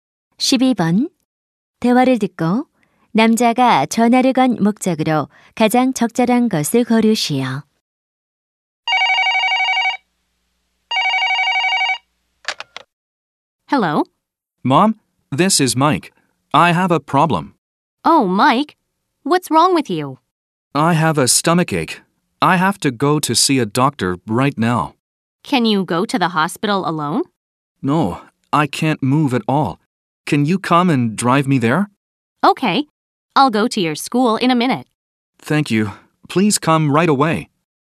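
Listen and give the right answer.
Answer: 병원에 차로 데려다 달라고 부탁하려고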